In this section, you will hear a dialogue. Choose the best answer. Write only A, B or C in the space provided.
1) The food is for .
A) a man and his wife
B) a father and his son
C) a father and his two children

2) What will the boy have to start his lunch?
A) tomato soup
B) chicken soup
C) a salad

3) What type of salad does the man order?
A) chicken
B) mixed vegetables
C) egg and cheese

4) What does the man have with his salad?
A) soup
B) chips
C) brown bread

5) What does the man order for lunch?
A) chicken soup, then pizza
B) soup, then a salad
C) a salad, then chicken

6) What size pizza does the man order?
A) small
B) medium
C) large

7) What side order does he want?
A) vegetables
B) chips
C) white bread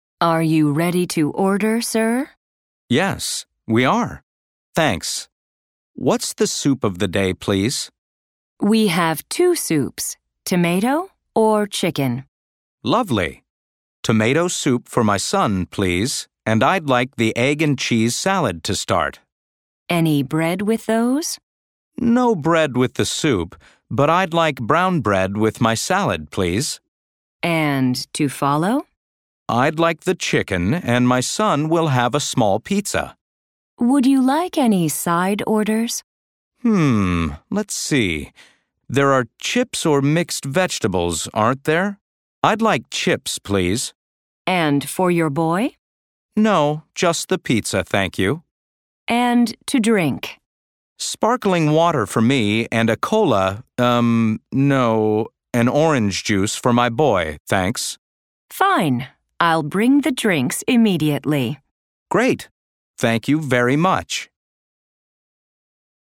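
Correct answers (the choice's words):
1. a father and his son
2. tomato soup
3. egg and cheese
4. brown bread
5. a salad, then chicken
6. small
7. chips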